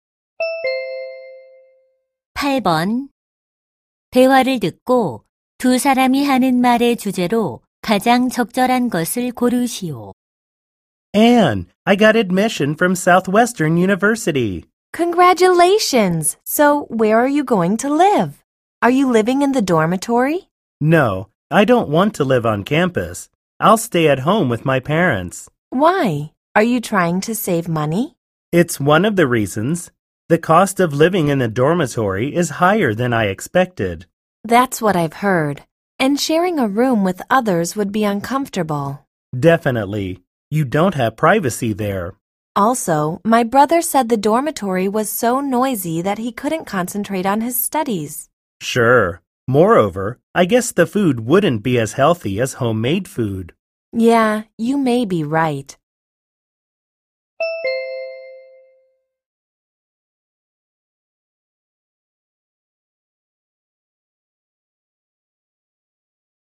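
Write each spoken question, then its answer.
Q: 대화를 듣고 두 사람이 하는 말의 주제로 가장 적절한 것을 고르시오.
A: 기숙사 생활의 단점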